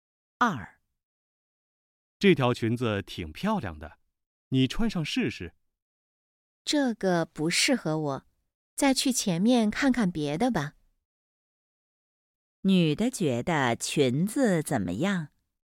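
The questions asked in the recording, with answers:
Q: 女的觉得裙子怎么样?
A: 不适合她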